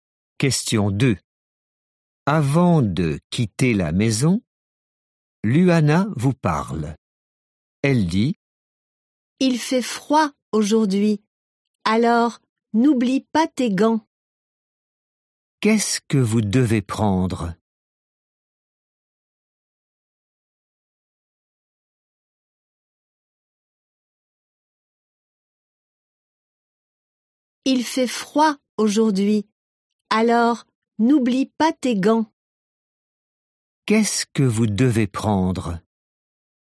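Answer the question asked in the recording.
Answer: Des gants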